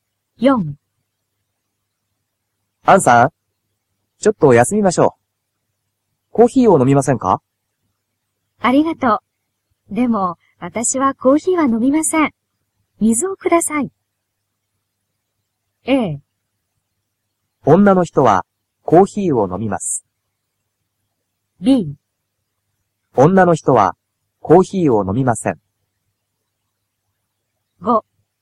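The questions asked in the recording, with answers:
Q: アンさん、ちょっと休みましょう。コーヒーを飲みませんか?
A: B: 女の人はコーヒーを飲みません。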